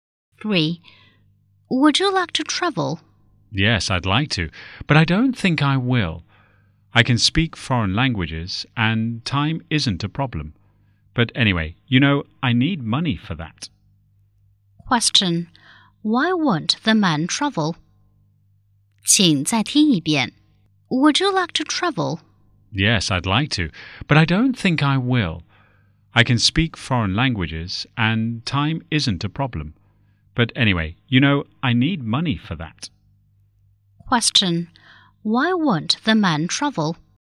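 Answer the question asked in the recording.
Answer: He doesn't have enough money.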